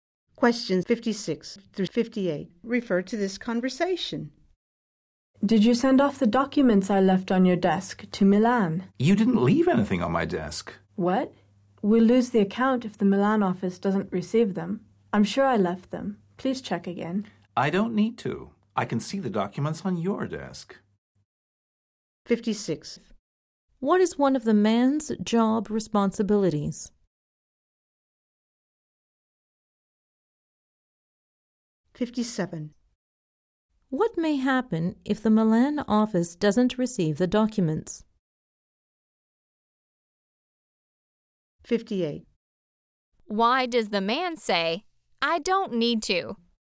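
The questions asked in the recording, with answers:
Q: What is one of the man's job responsibilities?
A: Sending documents

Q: What may happen if the Milan office doesn't receive the documents?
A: They will lose the account

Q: Why does the man say, "I don't need to"?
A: He can see the documents on the woman's desk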